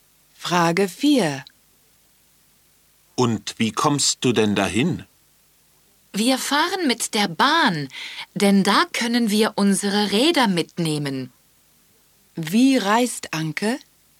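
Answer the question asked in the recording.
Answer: Mit der Bahn (mit Rädern)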